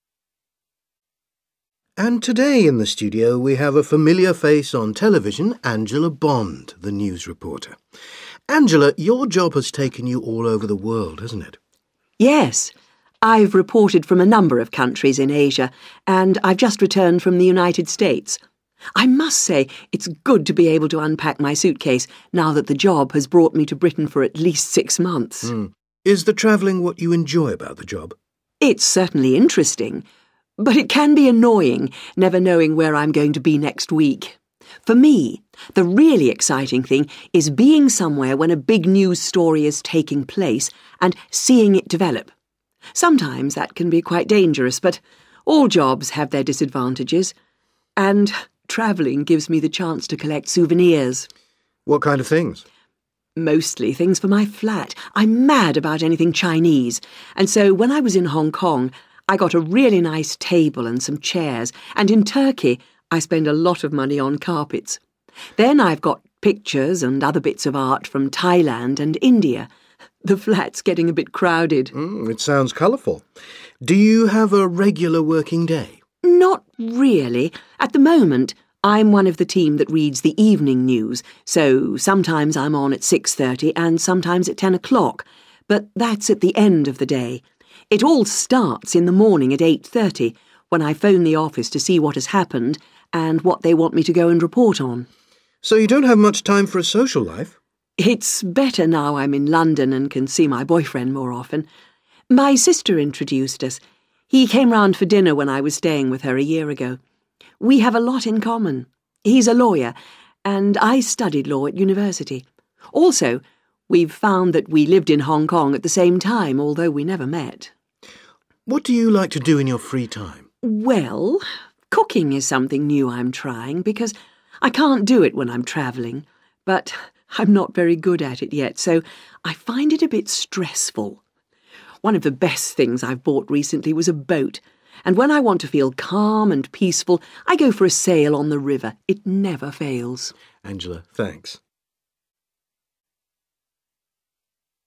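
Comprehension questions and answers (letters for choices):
Listen to the following interview and choose the best answer A, B or C for the question below.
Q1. What does Angela do to relax?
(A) She goes sailing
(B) She goes shopping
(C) She cooks a meal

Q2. What time does Angela's working day begin?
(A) 10.00 am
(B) 8.30 am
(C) 6.30 pm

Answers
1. A
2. B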